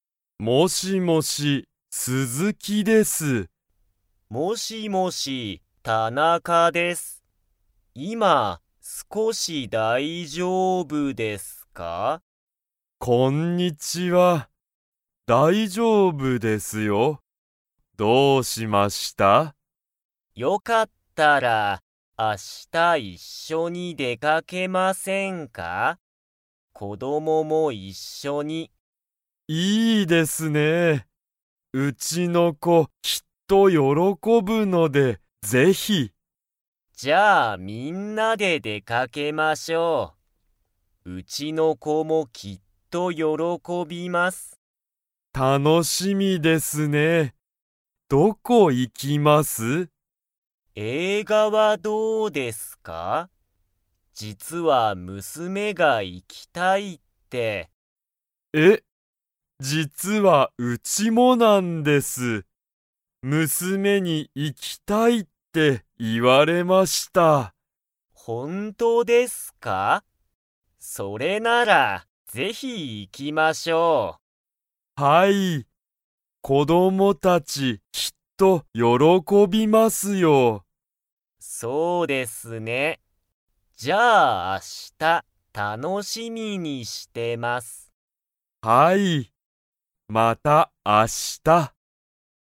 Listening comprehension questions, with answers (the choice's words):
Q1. 鈴木すずきさんと田中たなかさんは、明日あした一緒いっしょに 。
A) 出でかける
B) 出でかけない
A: 出でかける

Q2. 二人ふたりの娘むすめは、どこに行いきたいですか?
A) 駅えき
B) 会社かいしゃ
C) 学校がっこう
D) 映画えいが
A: 映画えいが

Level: Level 3